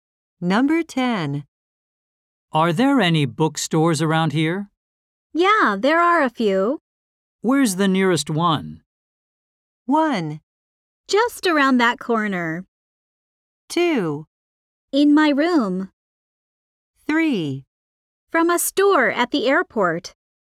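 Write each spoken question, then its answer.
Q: Where's the nearest one?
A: 1: Just around that corner.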